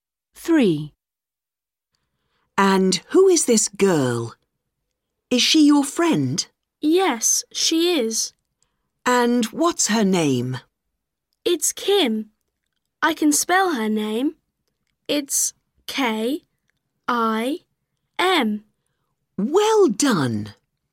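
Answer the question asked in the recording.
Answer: Kim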